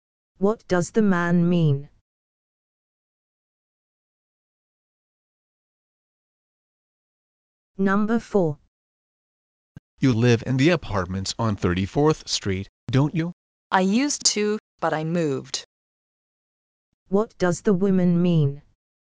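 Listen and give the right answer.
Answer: She no longer lives there; she moved.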